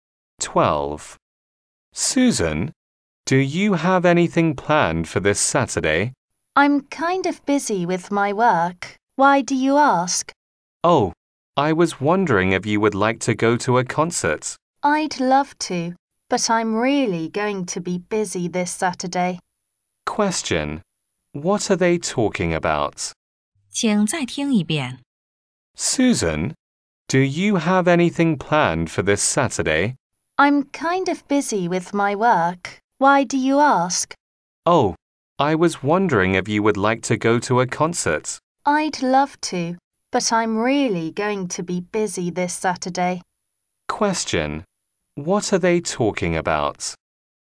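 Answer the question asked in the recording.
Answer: Going to a concert on Saturday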